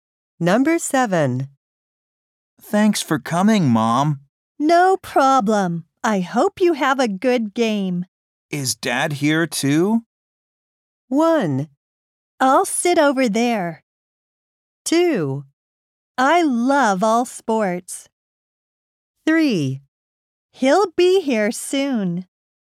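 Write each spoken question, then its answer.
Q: Is Dad here too?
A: 3: He'll be here soon.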